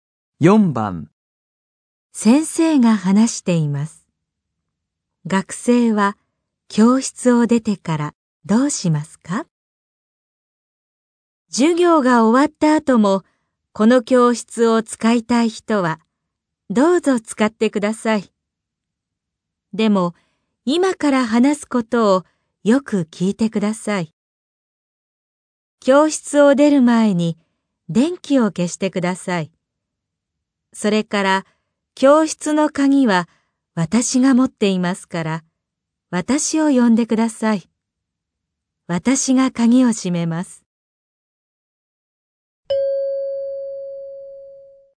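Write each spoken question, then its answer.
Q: 学生は教室を出てからどうしますか?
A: 先生を呼ぶ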